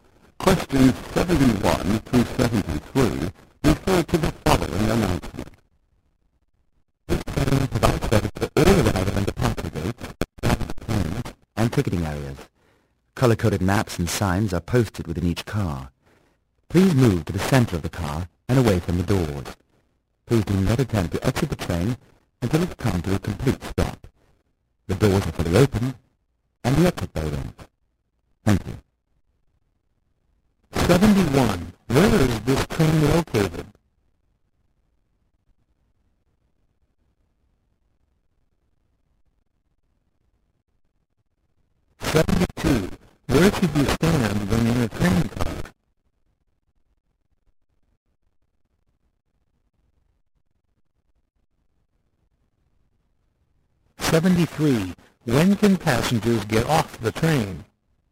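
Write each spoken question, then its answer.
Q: Where should you stand when in a train car?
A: In the center of the car, away from the doors

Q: When can passengers get off the train?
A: When the train has fully stopped, the doors are open and the exit bell rings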